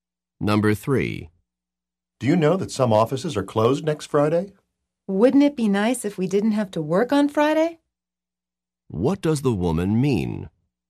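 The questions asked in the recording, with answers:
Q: What does the woman mean?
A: They do have to work on Friday.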